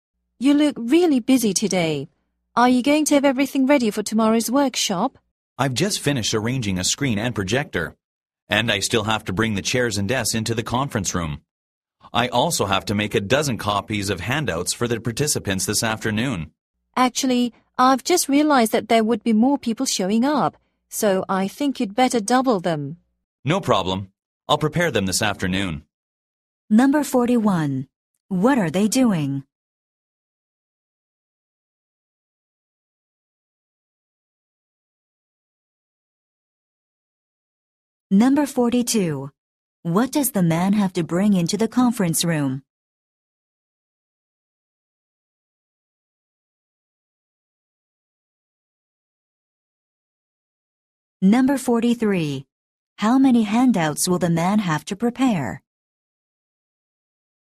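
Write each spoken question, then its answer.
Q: What are they doing?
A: Preparing for tomorrow's workshop

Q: What does the man have to bring into the conference room?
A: Chairs and desks

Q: How many handouts will the man have to prepare?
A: 24 (two dozen)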